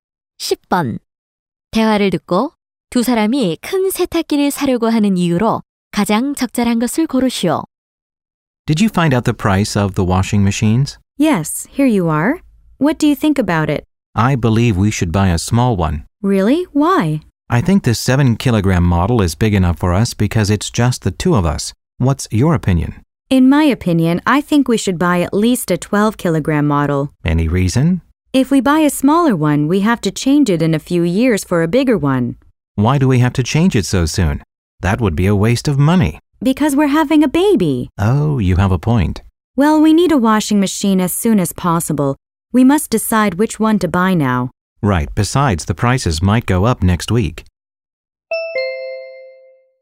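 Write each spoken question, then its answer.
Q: 대화를 듣고 두 사람이 큰 세탁기를 사려고 하는 이유로 가장 적절한 것을 고르시오.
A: 아기가 생길 예정이어서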